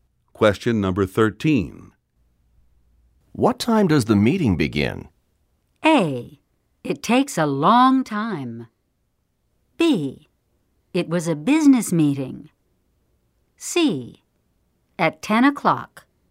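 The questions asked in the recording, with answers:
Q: What time does the meeting begin?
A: C: At 10 o'clock.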